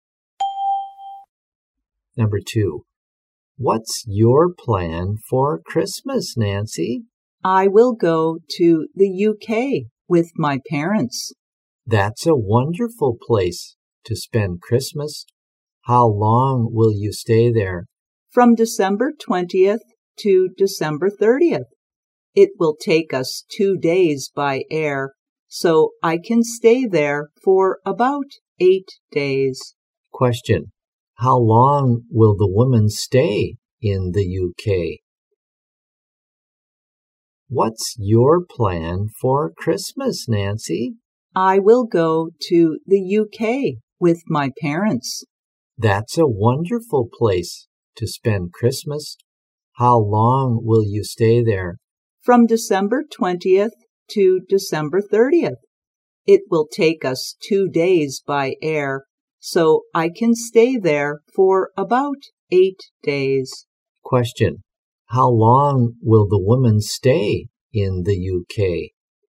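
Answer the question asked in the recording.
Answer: About 8 days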